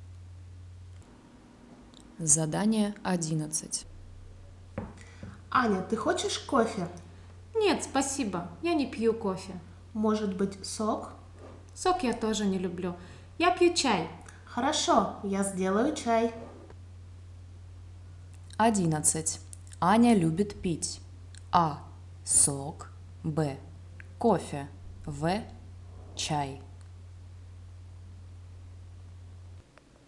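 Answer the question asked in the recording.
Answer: В: чай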